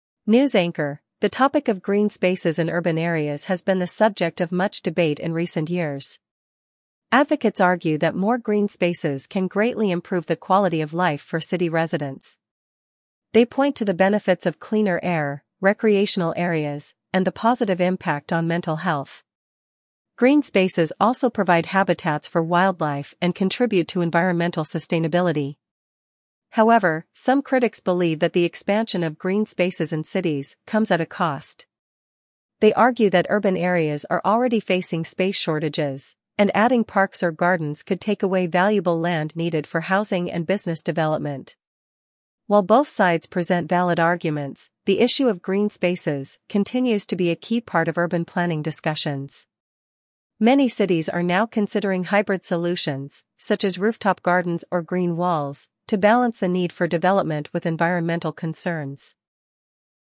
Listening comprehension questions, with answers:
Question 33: What benefits do advocates of green spaces highlight?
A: Cleaner air, recreational areas, and mental health benefits.

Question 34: What do critics argue about adding green spaces?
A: It takes away valuable land for housing and business.

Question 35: What environmental benefits are associated with green spaces?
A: Cleaner air, sustainability, and wildlife habitats.

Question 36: What hybrid solution is being considered by many cities?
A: Rooftop gardens and green walls.

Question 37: How is the debate about green spaces a part of urban planning?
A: It is a key part of urban planning.

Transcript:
News Anchor: The topic of green spaces in urban areas has been the subject of much debate in recent years. Advocates argue that more green spaces can greatly improve the quality of life for city residents. They point to the benefits of cleaner air, recreational areas, and the positive impact on mental health. Green spaces also provide habitats for wildlife and contribute to environmental sustainability.
However, some critics believe that the expansion of green spaces in cities comes at a cost. They argue that urban areas are already facing space shortages, and adding parks or gardens could take away valuable land needed for housing and business development.
While both sides present valid arguments, the issue of green spaces continues to be a key part of urban planning discussions. Many cities are now considering hybrid solutions, such as rooftop gardens or green walls, to balance the need for development with environmental concerns.